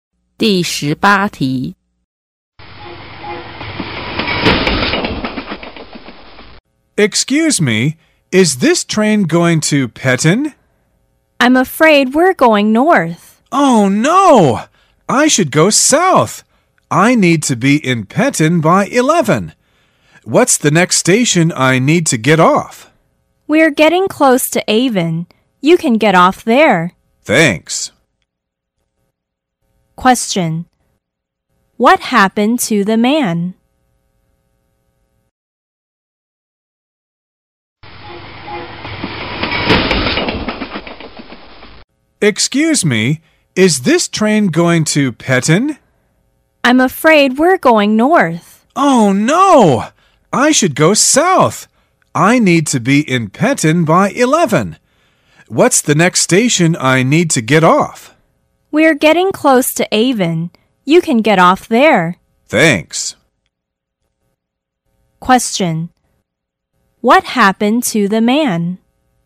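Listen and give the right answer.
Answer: He took the wrong train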